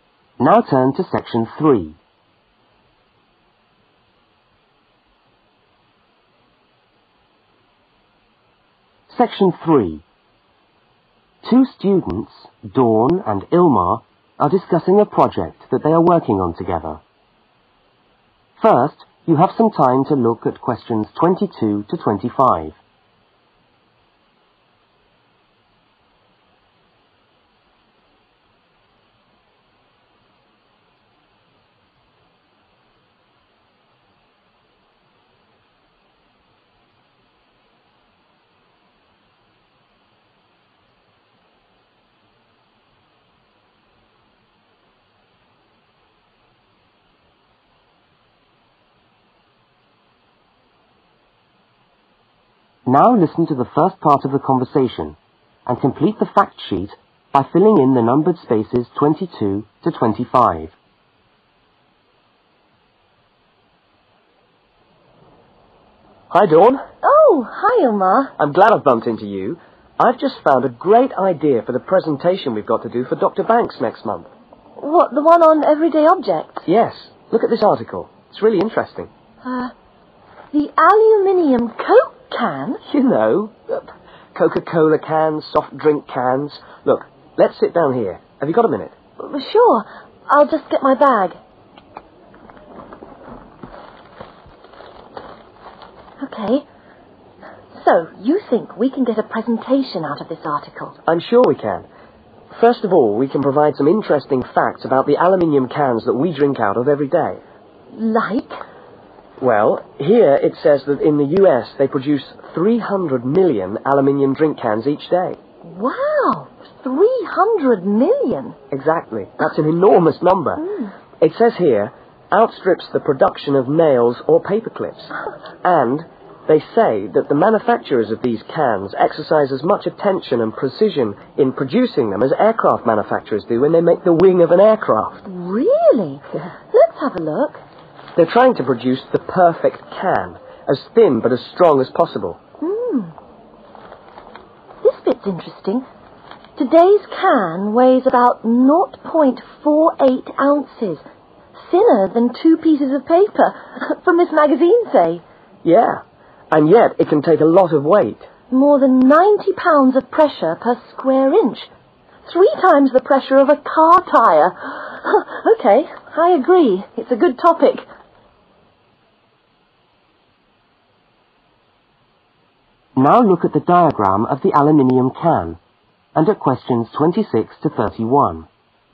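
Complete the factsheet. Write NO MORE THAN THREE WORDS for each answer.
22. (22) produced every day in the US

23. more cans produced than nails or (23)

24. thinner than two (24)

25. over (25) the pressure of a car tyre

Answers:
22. 300 million
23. paperclips
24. pieces of paper
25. three times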